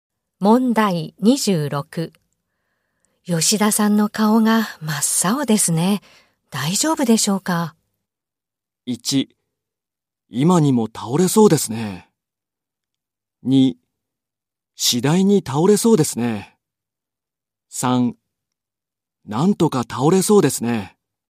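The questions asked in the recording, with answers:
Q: 吉田さんの顔が真っ青ですね。大丈夫でしょうか?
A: 1: 今にも倒れそうですね。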